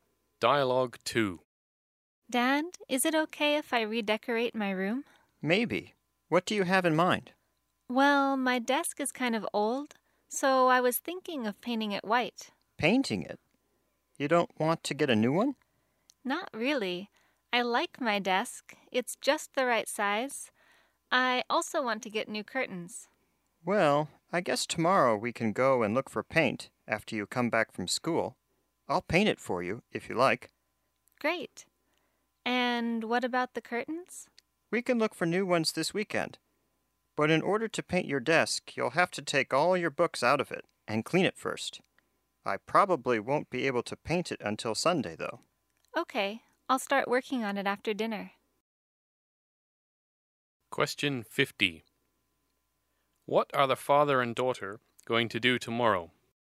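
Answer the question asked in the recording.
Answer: Go and look for paint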